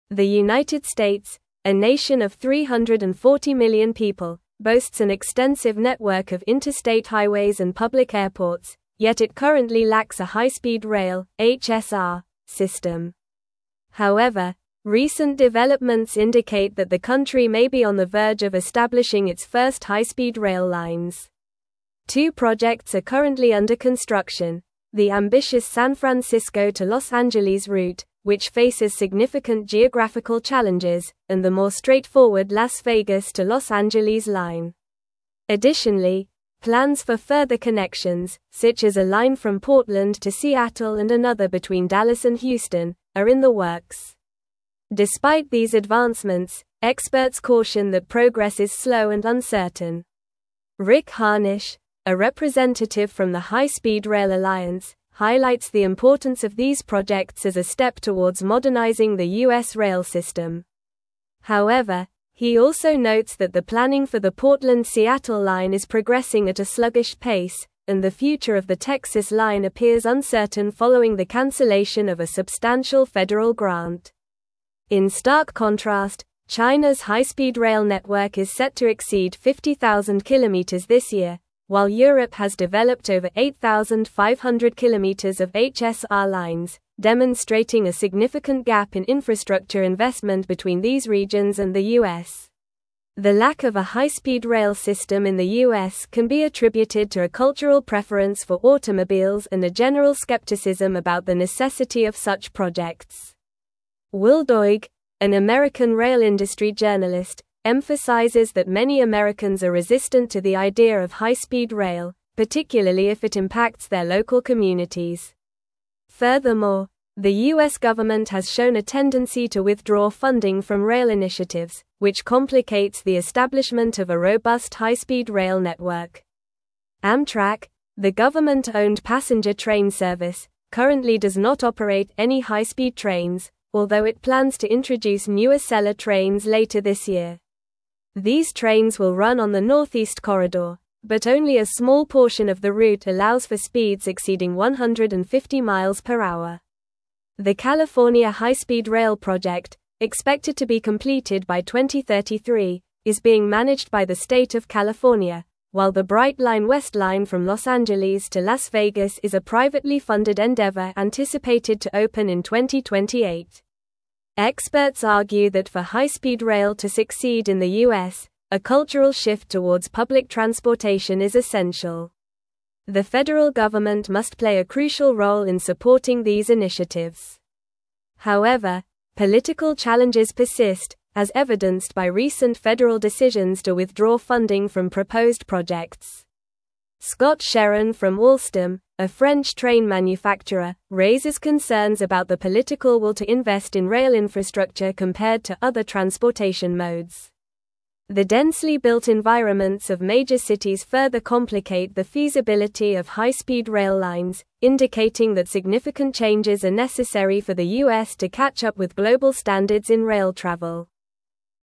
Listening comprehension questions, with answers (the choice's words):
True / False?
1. Plans for additional high-speed rail connections, including routes from Portland to Seattle and Dallas to Houston, are being developed.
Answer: True

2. Amtrak currently operates high-speed trains, and it has no plans to introduce new Acela trains that will run on the Northeast Corridor.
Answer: False

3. The United States presently has an efficient high-speed rail system despite having a small population and limited transportation infrastructure.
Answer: False

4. The San Francisco to Los Angeles route faces significant geographical challenges.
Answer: True

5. Cultural preferences for public transportation and enthusiasm about high-speed rail contribute to the abundance of such systems in the U.S.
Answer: False

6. Experts express concerns about the slow and uncertain progress of high-speed rail initiatives in the U.S.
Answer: True

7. Political challenges and funding withdrawals from rail initiatives hinder the establishment of a robust high-speed rail network in the U.S.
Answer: True

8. Several high-speed rail projects are on hold in the U.S.: one from San Francisco to Los Angeles and another from Las Vegas to Los Angeles.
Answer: False

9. The United States, a nation of 340 million people, boasts an extensive (1)______ of interstate highways and public airports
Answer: network

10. the more straightforward Las (2)______ to Los Angeles line.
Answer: Vegas

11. Additionally, (3)______ for further connections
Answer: plans

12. another between Dallas and (4)______, are in the works.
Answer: Houston

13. he also notes that the (5)______ for the Portland-Seattle line is progressing at a sluggish pace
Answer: planning

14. the cancellation of a substantial federal (6)______.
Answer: grant

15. network is set to (7)______ 50,000 kilometers this year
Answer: exceed

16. demonstrating a significant gap in (8)______ investment between these regions and the U.S.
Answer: infrastructure

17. the U.S. government has (9)______ a tendency to withdraw funding from rail initiatives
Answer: shown

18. Amtrak, the government-owned passenger train (10)______, currently does not operate any high-speed trains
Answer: service

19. although it plans to introduce new (11)______ trains later this year.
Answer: Acela

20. only a small portion of the route allows for speeds (12)______ 150 mph.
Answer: exceeding

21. a (13)______ shift towards public transportation is essential.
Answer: cultural

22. Scott Sherin from Alstom, a French train (14)______, (15)______ concerns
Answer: manufacturer

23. Scott Sherin from Alstom, a French train (14)______, (15)______ concerns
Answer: raises

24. for the U.S. to catch up with (16)______ standards in rail travel.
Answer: global

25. What is the current population of the United States?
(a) 250 million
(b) 400 million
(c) 340 million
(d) 300 million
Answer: 340 million

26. Which high-speed rail project faces significant geographical challenges?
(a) Las Vegas to Los Angeles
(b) San Francisco to Los Angeles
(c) Portland to Seattle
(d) Dallas to Houston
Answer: San Francisco to Los Angeles

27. What is the expected completion year for the California High-Speed Rail project?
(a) 2025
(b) 2030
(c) 2028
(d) 2033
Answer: 2033

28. Which organization is Rick Harnish associated with?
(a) High Speed Rail Alliance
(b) Amtrak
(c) Federal Railroad Administration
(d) National Transportation Safety Board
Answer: High Speed Rail Alliance

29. What is the primary reason for the lack of high-speed rail in the U.S.?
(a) Cultural preference for automobiles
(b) Lack of technology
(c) Insufficient funding from Europe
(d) Poor geographical conditions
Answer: Cultural preference for automobiles

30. What type of trains does Amtrak plan to introduce later this year?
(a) High-speed bullet trains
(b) Freight trains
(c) Acela trains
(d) Commuter trains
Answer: Acela trains

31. What is the anticipated opening year for the Brightline West line from Los Angeles to Las Vegas?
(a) 2030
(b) 2025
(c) 2033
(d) 2028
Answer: 2028

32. What must happen for high-speed rail to succeed in the U.S.?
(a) More highways constructed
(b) A cultural shift towards public transportation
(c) Increased automobile production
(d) Expansion of airport facilities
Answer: A cultural shift towards public transportation

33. What are the two high-speed rail projects currently under construction in the United States?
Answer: The two high-speed rail projects currently under construction are the San Francisco to Los Angeles route and the Las Vegas to Los Angeles line.

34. What cultural factors contribute to the lack of a high-speed rail system in the U.S.?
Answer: Cultural factors include a preference for automobiles and skepticism about the necessity of high-speed rail projects, with many Americans resistant to the idea, especially if it impacts their local communities.

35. What challenges does the San Francisco to Los Angeles high-speed rail project face?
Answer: The San Francisco to Los Angeles high-speed rail project faces significant geographical challenges.

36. Why is the future of the Texas high-speed rail line considered uncertain?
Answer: The future of the Texas high-speed rail line is uncertain following the cancellation of a substantial federal grant.

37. What role does Amtrak play in the current state of high-speed rail in the U.S.?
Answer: Amtrak currently does not operate any high-speed trains but plans to introduce new Acela trains later this year that will run on the Northeast Corridor.

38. According to experts, what changes are necessary for high-speed rail to succeed in the United States?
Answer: Experts argue that a cultural shift towards public transportation is essential, along with increased federal government support for rail initiatives.

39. How do political decisions impact the funding and development of high-speed rail initiatives in the U.S.?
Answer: Political decisions, such as the federal government's tendency to withdraw funding from proposed projects, complicate the establishment and development of high-speed rail initiatives in the U.S.

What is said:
The United States, a nation of 340 million people, boasts an extensive network of interstate highways and public airports, yet it currently lacks a high-speed rail (HSR) system. However, recent developments indicate that the country may be on the verge of establishing its first high-speed rail lines. Two projects are currently under construction: the ambitious San Francisco to Los Angeles route, which faces significant geographical challenges, and the more straightforward Las Vegas to Los Angeles line. Additionally, plans for further connections, such as a line from Portland to Seattle and another between Dallas and Houston, are in the works. Despite these advancements, experts caution that progress is slow and uncertain.
Rick Harnish, a representative from the High Speed Rail Alliance, highlights the importance of these projects as a step towards modernizing the U.S. rail system. However, he also notes that the planning for the Portland-Seattle line is progressing at a sluggish pace, and the future of the Texas line appears uncertain following the cancellation of a substantial federal grant. In stark contrast, Chinaβs high-speed rail network is set to exceed 50,000 kilometers this year, while Europe has developed over 8,500 kilometers of HSR lines, demonstrating a significant gap in infrastructure investment between these regions and the U.S.
The lack of a high-speed rail system in the U.S. can be attributed to a cultural preference for automobiles and a general skepticism about the necessity of such projects. Will Doig, an American rail industry journalist, emphasizes that many Americans are resistant to the idea of high-speed rail, particularly if it impacts their local communities. government has shown a tendency to withdraw funding from rail initiatives, which complicates the establishment of a robust high-speed rail network.
Amtrak, the government-owned passenger train service, currently does not operate any high-speed trains, although it plans to introduce new Acela trains later this year. These trains will run on the Northeast Corridor, but only a small portion of the route allows for speeds exceeding 150 mph. The California High-Speed Rail project, expected to be completed by 2033, is being managed by the state of California, while the Brightline West line from Los Angeles to Las Vegas is a privately funded endeavor anticipated to open in 2028.
Experts argue that for high-speed rail to succeed in the U.S., a cultural shift towards public transportation is essential. The federal government must play a crucial role in supporting these initiatives. However, political challenges persist, as evidenced by recent federal decisions to withdraw funding from proposed projects. Scott Sherin from Alstom, a French train manufacturer, raises concerns about the political will to invest in rail infrastructure compared to other transportation modes. The densely built environments of major cities further complicate the feasibility of high-speed rail lines, indicating that significant changes are necessary for the U.S. to catch up with global standards in rail travel.